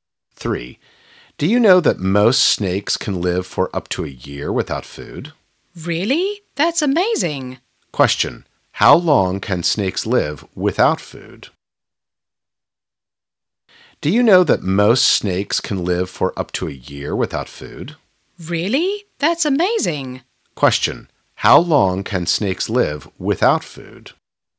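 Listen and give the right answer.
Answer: Up to a year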